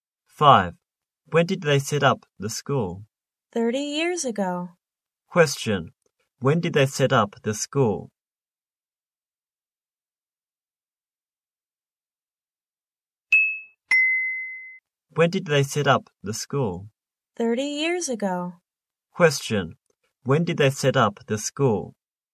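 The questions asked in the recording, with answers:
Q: When did they set up the school?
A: 30 years ago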